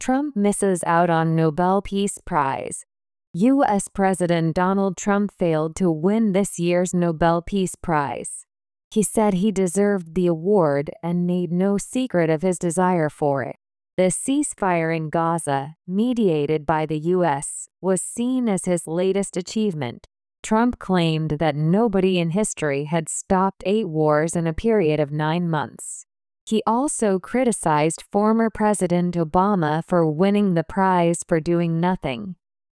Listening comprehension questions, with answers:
次の各質問の答えを探しながら聞きましょう。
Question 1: What did President Trump say about the Nobel Peace Prize?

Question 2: What was seen as Trump's latest achievement?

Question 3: What did Trump criticize former President Obama for?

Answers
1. He said he deserved the award and made no secret of his desire for it.
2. The ceasefire in Gaza, mediated by the U.S., was seen as his latest achievement.
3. He criticized him for winning the prize for doing nothing.

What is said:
Trump Misses Out on Nobel Peace Prize
US President Donald Trump failed to win this year's Nobel Peace Prize.
He said he deserved the award and made no secret of his desire for it.
The ceasefire in Gaza, mediated by the U.S., was seen as his latest achievement.
Trump claimed that nobody in history had stopped eight wars in a period of nine months.
He also criticized former President Obama for winning the prize for doing nothing.

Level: 中級脱出